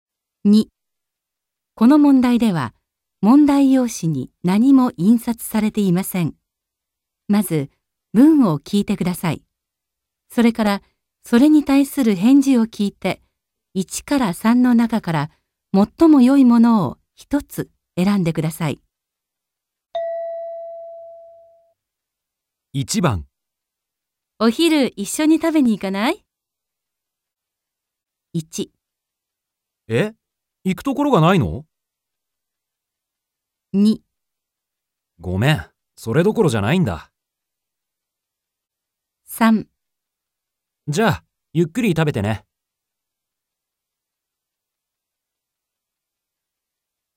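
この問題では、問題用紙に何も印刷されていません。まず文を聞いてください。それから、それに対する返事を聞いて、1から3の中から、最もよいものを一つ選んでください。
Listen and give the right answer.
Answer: 2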